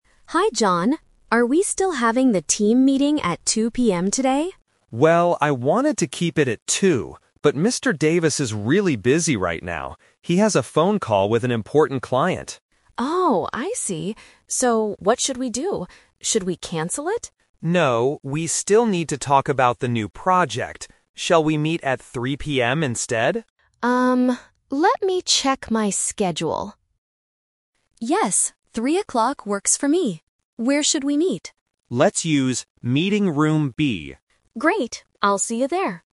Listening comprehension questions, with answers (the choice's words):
Listen to the conversation and choose the correct answer (A, B, or C).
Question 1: What time is the team meeting going to start?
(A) At 2:00 PM.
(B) At 3:00 PM.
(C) Tomorrow morning.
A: At 3:00 PM.

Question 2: Why are they changing the time?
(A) Because their manager is busy.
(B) Because they want to cancel the project.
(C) Because John is not at the office.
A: Because their manager is busy.

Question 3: Where are they going to meet?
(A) In Mr. Davis's office.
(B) In Meeting Room (B)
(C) At the client's office.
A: In Meeting Room (B)

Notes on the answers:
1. John suggests, "Shall we meet at 3:00 PM instead?" and Emily agrees. Option A is the Trap (2:00 PM was the original plan, but they changed it). Option C is a plausible time but is not mentioned.
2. John says that Mr. Davis (the manager) is "really busy right now" because of a phone call. Option B is a Trap (Emily asks "Should we cancel it?" and they mention the "project", but John says "No"). Option C is not mentioned.
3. John clearly says, "Let's use Meeting Room (B)" Option A is not mentioned. Option C is the Trap (John mentions a "client" on the phone, but they are not going to the client's office).